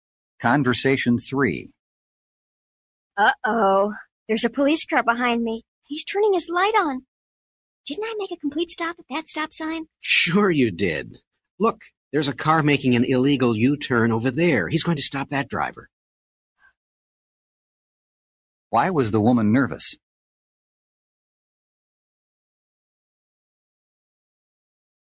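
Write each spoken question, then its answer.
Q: Why was the woman nervous?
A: A police car was behind her with its light on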